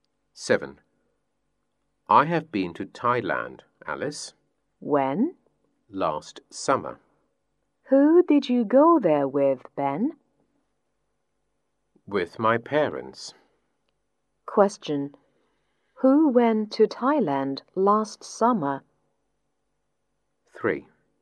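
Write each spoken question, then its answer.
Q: Who went to Thailand last summer?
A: Ben and his parents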